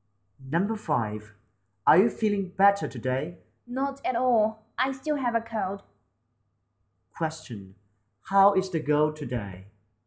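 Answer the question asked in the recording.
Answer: She still has a cold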